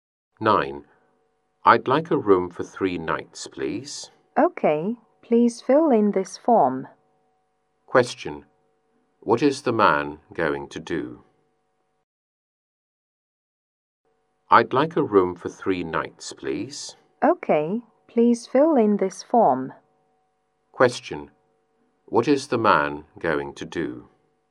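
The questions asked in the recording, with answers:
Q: What is the man going to do?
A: Fill in a form to book a room for 3 nights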